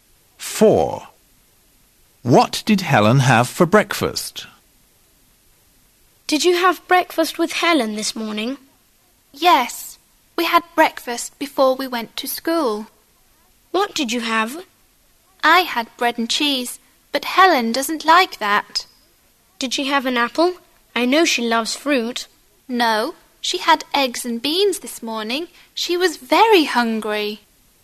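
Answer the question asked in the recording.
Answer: eggs and beans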